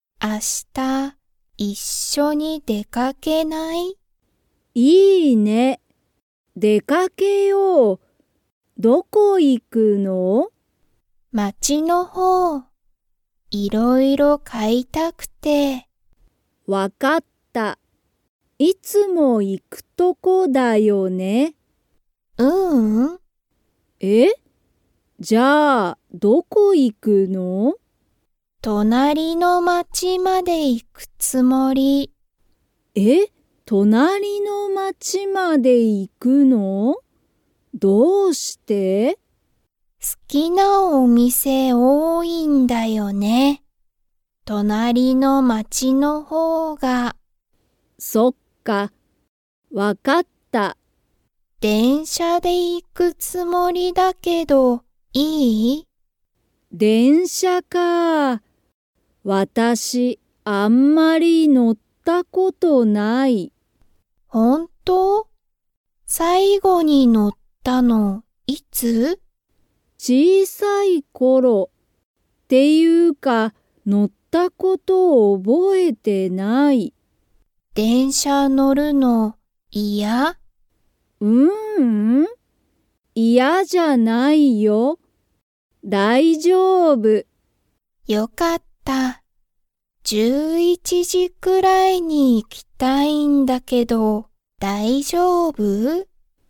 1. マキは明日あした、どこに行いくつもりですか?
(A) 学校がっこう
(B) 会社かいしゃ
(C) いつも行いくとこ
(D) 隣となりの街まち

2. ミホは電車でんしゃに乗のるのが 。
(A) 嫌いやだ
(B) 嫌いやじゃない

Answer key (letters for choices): 1D, 2B

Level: Level 3